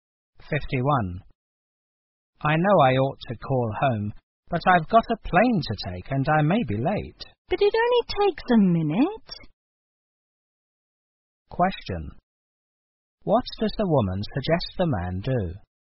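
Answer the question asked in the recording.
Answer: Call home before leaving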